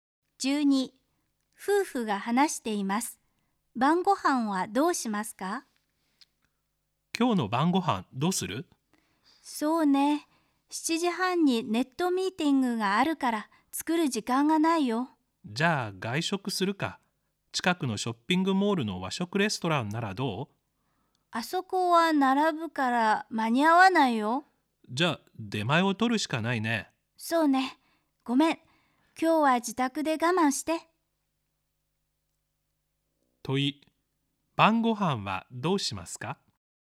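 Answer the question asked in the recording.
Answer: 出前を取る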